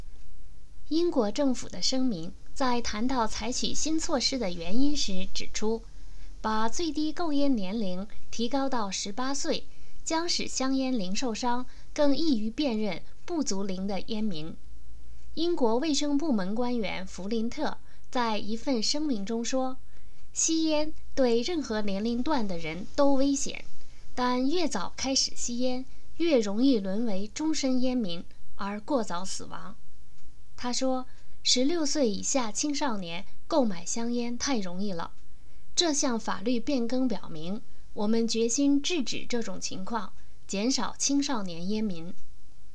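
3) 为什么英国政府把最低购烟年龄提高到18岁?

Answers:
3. 使香烟零售商更易于辨认不足龄的烟民,减少青少年烟民

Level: 3rd Year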